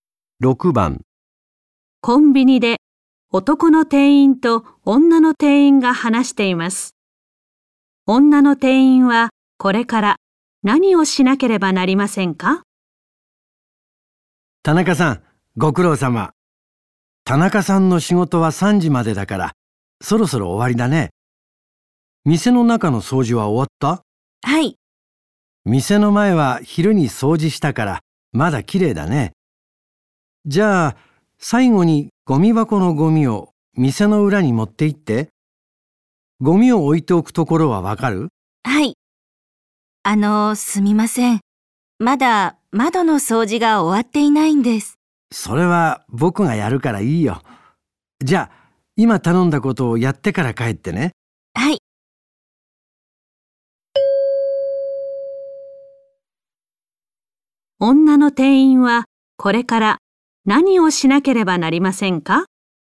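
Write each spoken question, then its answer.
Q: 女の店員はこれから何をしなければなりませんか?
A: ゴミ箱のゴミを店の裏に持っていく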